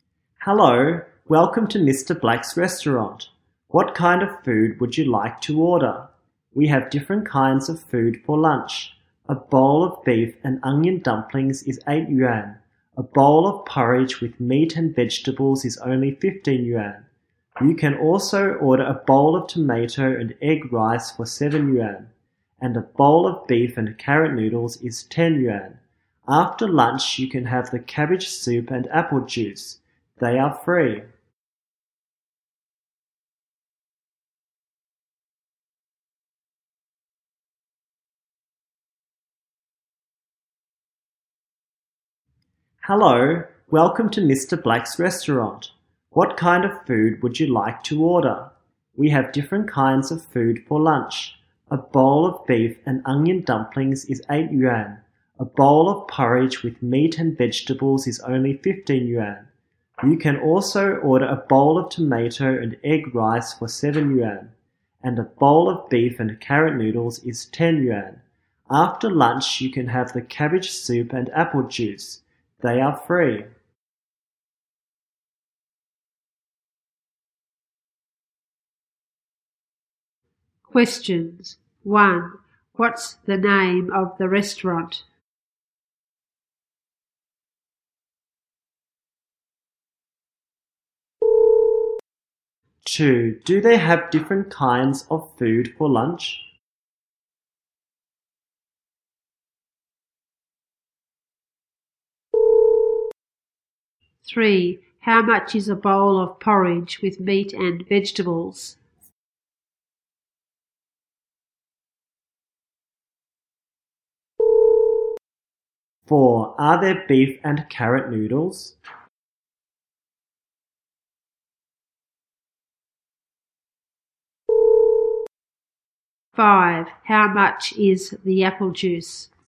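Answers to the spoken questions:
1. Mr. Black's restaurant
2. Yes, they do
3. 15 yuan
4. Yes, there are
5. It's free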